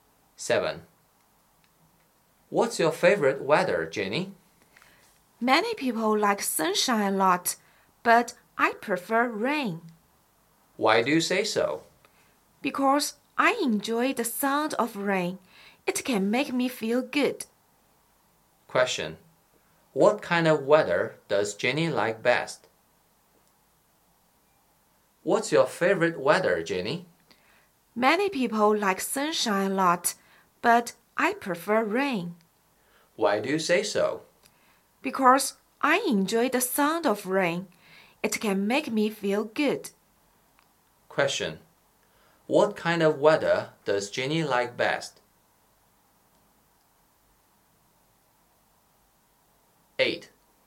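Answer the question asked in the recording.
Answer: Rainy weather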